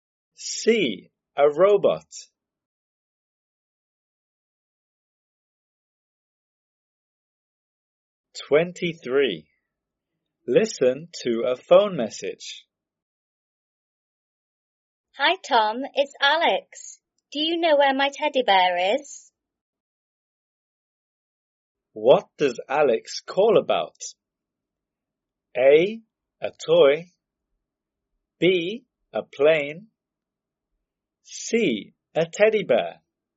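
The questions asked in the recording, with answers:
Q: What does Alex call about?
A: C: A teddy bear.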